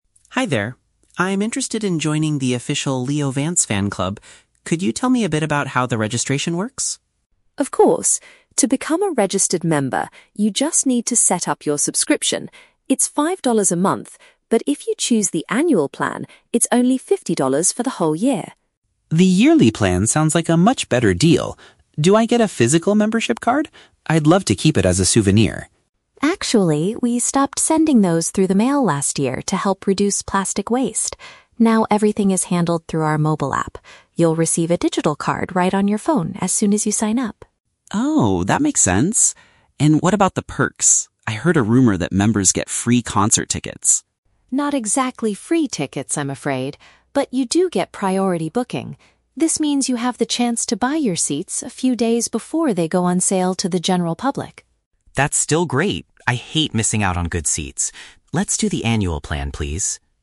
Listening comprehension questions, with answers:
Listen to a conversation between a fan and a fan club representative. Choose the correct answer (A, B, or C) for each question.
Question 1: How much does it cost to join the fan club for a full year?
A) Five dollars.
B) Fifty dollars.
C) It is completely free.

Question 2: How will Alex receive his membership card?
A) It will be delivered to his home address by mail.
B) He will access it electronically on his smart device.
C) He needs to pick up a physical card at the next concert.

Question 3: What is the actual benefit of joining the fan club, according to the representative?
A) Members can attend the artist's concerts without paying.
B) Members will receive a free plastic souvenir in the mail.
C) Members get the opportunity to purchase concert tickets early.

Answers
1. B
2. B
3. C

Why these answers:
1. Jamie says that "if you choose the annual plan, it's only fifty dollars for the whole year." Why the traps are wrong: (A) is a trap. "Five dollars" is mentioned, but that is the cost for just one month, not the full year. (C) is a trap. Alex mentions hearing a rumor about "free" tickets, but the membership itself is not free.
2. Jamie explains that members receive a "digital card right on your phone" (which paraphrases to accessing it electronically on a smart device). Why the traps are wrong: (A) is a trap. Alex asks for a physical card to keep as a souvenir, but Jamie explicitly states they "stopped sending those through the mail." (C) is a plausible fan club activity, but it is not mentioned in the audio.
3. Jamie says members get "priority booking," meaning they have the chance to "buy your seats a few days before" everyone else (which paraphrases to purchasing concert tickets early). Why the traps are wrong: (A) is a trap. Alex asks if members get "free concert tickets," but Jamie immediately corrects him, saying "Not exactly free tickets, I'm afraid." (B) is a trap. Alex wanted a physical card as a souvenir, but they no longer make plastic cards to reduce waste.

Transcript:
Alex: Hi there! I'm interested in joining the official Leo Vance fan club. Could you tell me a bit about how the registration works?
Jamie: Of course! To become a registered member, you just need to set up your subscription. It's five dollars a month, but if you choose the annual plan, it's only fifty dollars for the whole year.
Alex: The yearly plan sounds like a much better deal. Do I get a physical membership card? I'd love to keep it as a souvenir.
Jamie: Actually, we stopped sending those through the mail last year to help reduce plastic waste. Now, everything is handled through our mobile app. You'll receive a digital card right on your phone as soon as you sign up.
Alex: Oh, that makes sense. And what about the perks? I heard a rumor that members get free concert tickets.
Jamie: Not exactly free tickets, I'm afraid. But you do get priority booking. This means you have the chance to buy your seats a few days before they go on sale to the general public.
Alex: That's still great! I hate missing out on good seats. Let's do the annual plan, please.

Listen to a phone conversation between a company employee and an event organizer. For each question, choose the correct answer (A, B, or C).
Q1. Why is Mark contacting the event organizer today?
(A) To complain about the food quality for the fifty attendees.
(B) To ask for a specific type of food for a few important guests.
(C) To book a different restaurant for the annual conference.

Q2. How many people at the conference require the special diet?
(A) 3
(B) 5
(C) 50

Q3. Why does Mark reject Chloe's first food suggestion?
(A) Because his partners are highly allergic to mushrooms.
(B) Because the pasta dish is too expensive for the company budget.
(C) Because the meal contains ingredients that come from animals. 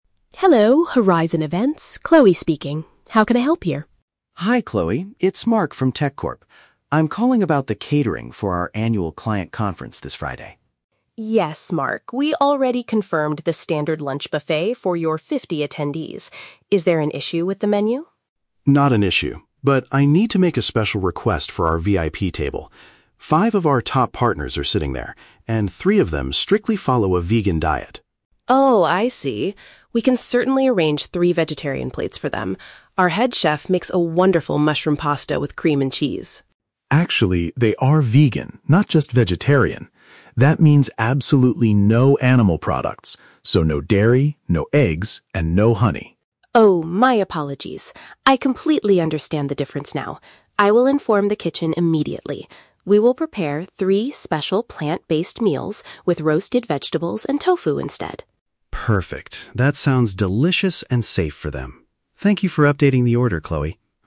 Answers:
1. B
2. A
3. C

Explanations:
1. Mark says he needs to make a "special request for our VIP table" because some partners follow a "vegan diet" (asking for a specific type of food). Option (A) is a trap; Chloe asks if there is an "issue" with the menu for the "fifty attendees," but Mark says "Not an issue." Option (C) is not mentioned.
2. Mark explicitly states that "three of them strictly follow a vegan diet." Option (B) is a trap; there are 5 partners sitting at the VIP table, but only 3 need the vegan meal. Option (C) is a trap; 50 is the total number of people attending the conference.
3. Chloe suggests a pasta with "cream and cheese," but Mark rejects it because vegans eat "absolutely no animal products—so no dairy, no eggs." (Cream and cheese are dairy products coming from animals). Option (A) is a trap; mushrooms are mentioned, but allergies are not the reason. Option (B) is a trap; price is never discussed.

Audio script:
Chloe: Hello, Horizon Events, Chloe speaking. How can I help you?
Mark: Hi Chloe, it's Mark from TechCorp. I'm calling about the catering for our annual client conference this Friday.
Chloe: Yes, Mark. We already confirmed the standard lunch buffet for your fifty attendees. Is there an issue with the menu?
Mark: Not an issue, but I need to make a special request for our VIP table. Five of our top partners are sitting there, and three of them strictly follow a vegan diet.
Chloe: Oh, I see. We can certainly arrange three vegetarian plates for them. Our head chef makes a wonderful mushroom pasta with cream and cheese.
Mark: Actually, they are vegan, not just vegetarian. That means absolutely no animal products—so no dairy, no eggs, and no honey.
Chloe: Oh, my apologies! I completely understand the difference now. I will inform the kitchen immediately. We will prepare three special plant-based meals with roasted vegetables and tofu instead.
Mark: Perfect, that sounds delicious and safe for them. Thank you for updating the order, Chloe.

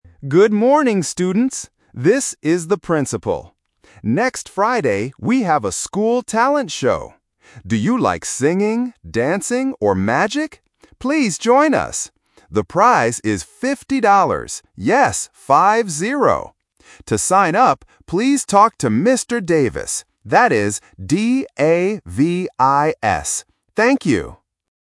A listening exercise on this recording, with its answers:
Listen to the principal talking on the school radio. Choose the correct answer (A, B, or C) for each question.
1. What hobbies does the principal talk about?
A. Singing, dancing, and music.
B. Singing, dancing, and magic.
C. Reading, dancing, and magic.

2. How much is the prize?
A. $15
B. $50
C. $5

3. How do you spell the teacher's name?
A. D-E-V-I-S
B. D-A-B-I-S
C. D-A-V-I-S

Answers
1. B
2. B
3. C

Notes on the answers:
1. The principal clearly asks, "Do you like singing, dancing, or magic?". Option (A) is a phonetic trap because "music" sounds a little bit like "magic", and it fits the topic. Option (C) "Reading" is a hobby but is never mentioned in the audio.
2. The principal says the prize is "fifty dollars" and repeats it as "five-zero" to make it very clear. Option (A) "$15" (fifteen) is the classic trap for the "-teen" vs "-ty" sound. Option (C) "$5" (five) is incorrect.
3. The principal spells the teacher's name letter by letter as "D-A-V-I-S". Option (A) uses an 'E' instead of an 'A', which is a common vowel confusion trap. Option (B) uses a 'B' instead of a 'V', testing the difference between consonant sounds.

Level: A1

